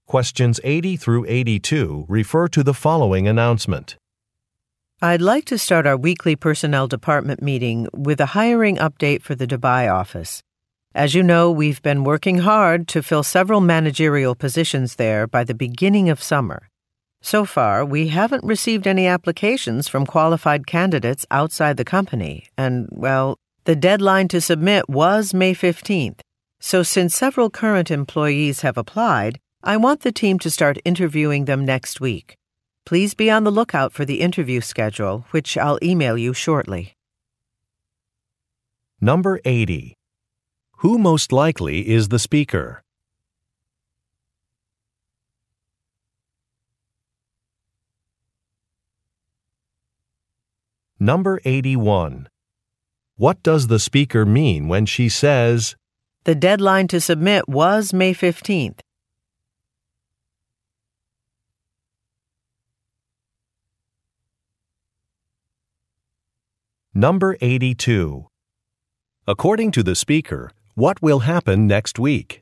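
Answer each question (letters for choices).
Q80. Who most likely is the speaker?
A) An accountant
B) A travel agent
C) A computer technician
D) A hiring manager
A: D

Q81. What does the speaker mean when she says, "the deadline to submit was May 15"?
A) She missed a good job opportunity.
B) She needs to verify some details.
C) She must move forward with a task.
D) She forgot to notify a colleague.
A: C

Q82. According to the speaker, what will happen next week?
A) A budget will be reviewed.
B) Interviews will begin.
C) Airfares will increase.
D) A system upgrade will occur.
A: B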